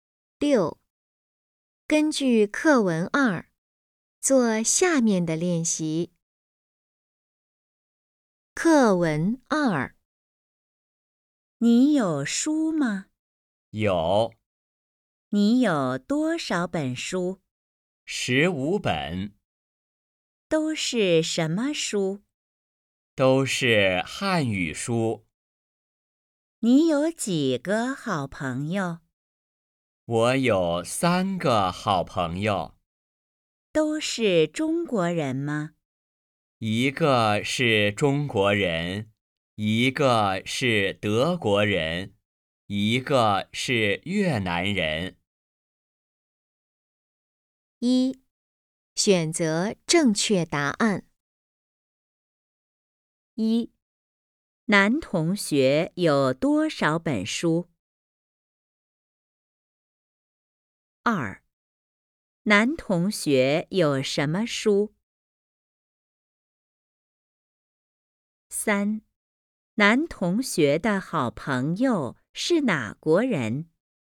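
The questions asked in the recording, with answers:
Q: 男同学有多少本书?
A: 15本

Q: 男同学有什么书?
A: 汉语书

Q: 男同学的好朋友是哪国人?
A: 一个是中国人,一个是德国人,一个是越南人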